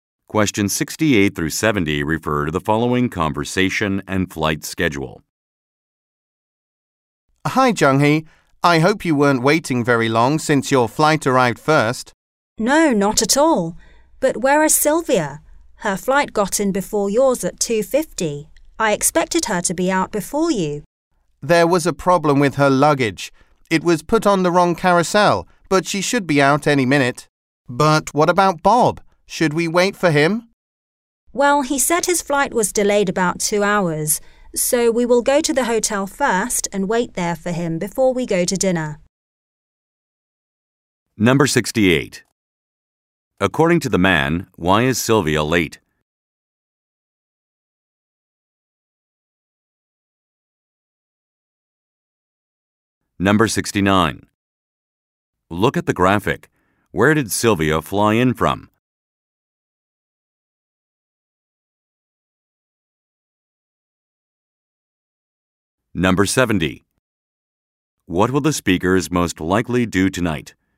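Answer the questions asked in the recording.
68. There was a problem with her luggage; it was put on the wrong carousel.
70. Go to the hotel, wait for Bob there, and then go to dinner.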